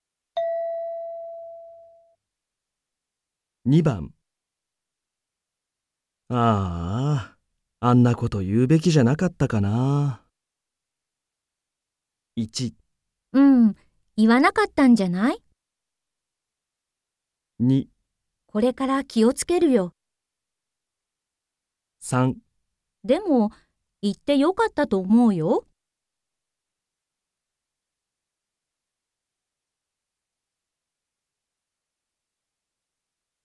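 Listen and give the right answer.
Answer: でも、言ってよかったと思うよ。

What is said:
M: あーあ、あんなこと言うべきじゃなかったかなあ。
F: 1 うん、言わなかったんじゃない?
2 これから気をつけるよ。
3 でも、言ってよかったと思うよ。

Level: N3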